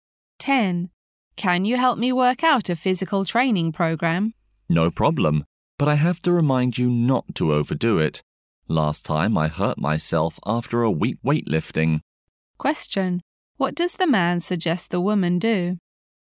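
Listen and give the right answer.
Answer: Not overdo the training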